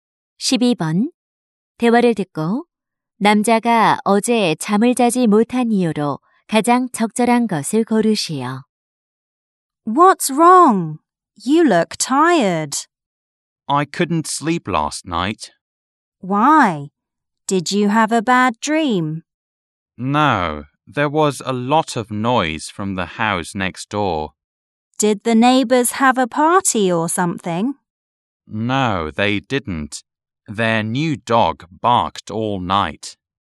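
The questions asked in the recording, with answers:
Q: 대화를 듣고 남자가 어제 잠을 자지 못한 이유로 가장 적절한 것을 고르시오.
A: 이웃집 새 개가 밤새 짖어서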